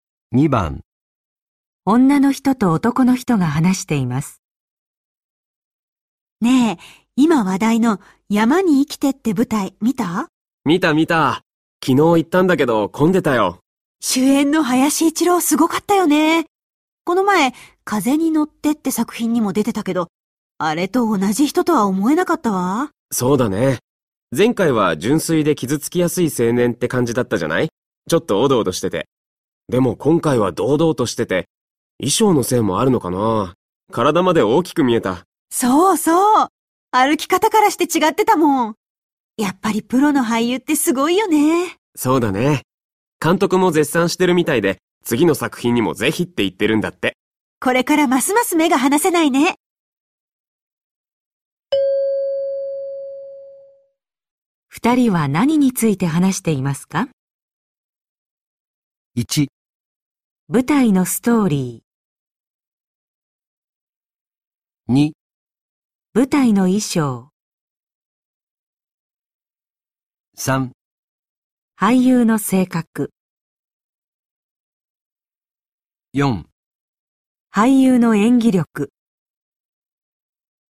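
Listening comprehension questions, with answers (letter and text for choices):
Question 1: 二人は何について話していますか。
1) 舞台のストーリ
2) 舞台の衣装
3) 俳優の性格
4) 俳優の演技力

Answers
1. 4) 俳優の演技力

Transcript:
女の人と男の人が話しています。
A:ねえ、今話題の「山に生きて」って舞台、見た?
B:見た見た。昨日行ったんだけど、込んでたよ。
A:終演の林一郎、すごかったよね。この前、「風に乗って」って作品にも出てたけど。あれと同じ人とは思えなかったわ。
B:そうだね。前回は純粋で傷つきやすい青年って感じだったじゃない?ちょっとおどおどしてて。でも、今回は堂々としてて。衣装のせいもあるのかな、体まで、大きく見えた。
A:そうそう。歩き方からして違ってたもん。やっぱりプロの俳優ってすごいよね。
B:そうだね。監督も絶賛してるみたいで、次の作品にもぜひって言ってるんだって。
A:これからますます目が離せないね。

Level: N1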